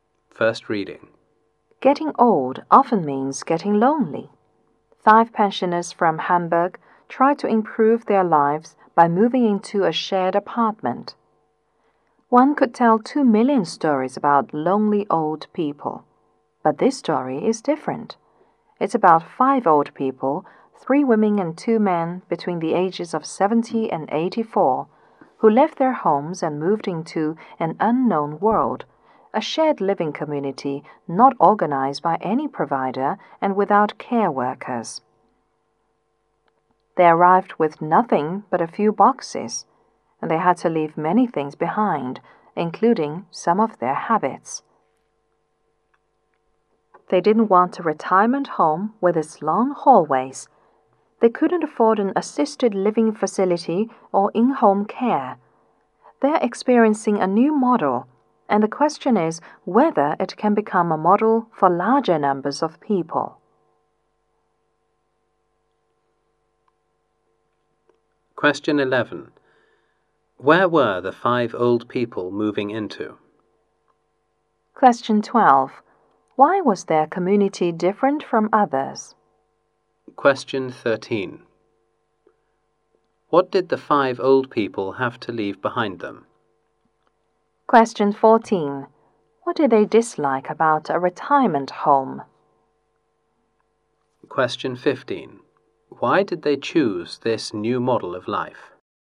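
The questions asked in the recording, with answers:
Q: Where were the 5 old people moving into?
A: A shared apartment

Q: Why was their community different from others?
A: No provider or care workers

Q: What did the 5 old people have to leave behind them?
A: Many things, including habits

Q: What did they dislike about a retirement home?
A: Its long hallways

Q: Why did they choose this new model of life?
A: Couldn't afford assisted living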